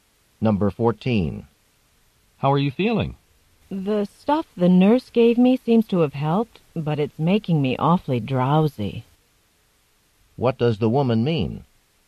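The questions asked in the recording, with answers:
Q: What does the woman mean?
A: The medicine helped, but it makes her very sleepy.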